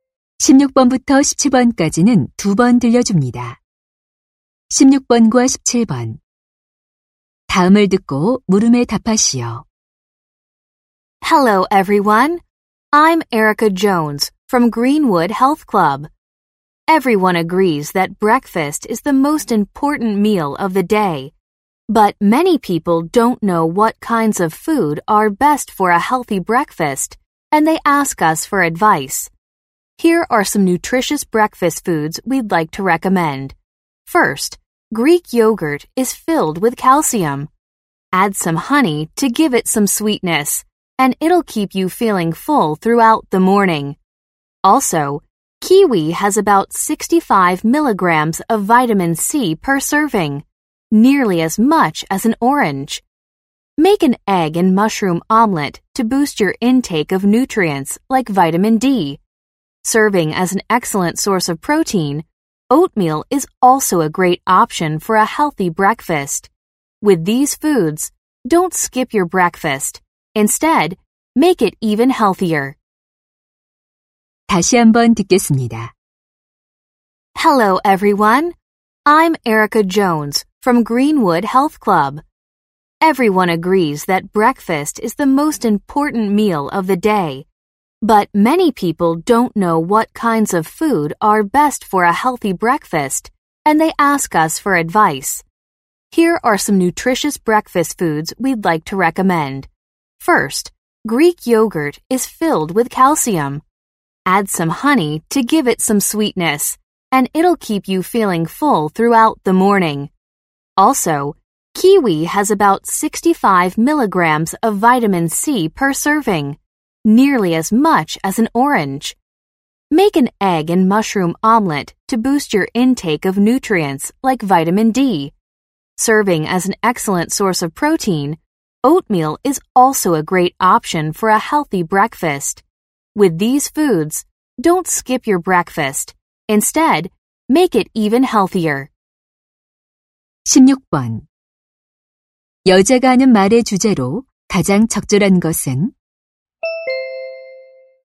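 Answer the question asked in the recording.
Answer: 건강한 아침 식사를 위한 음식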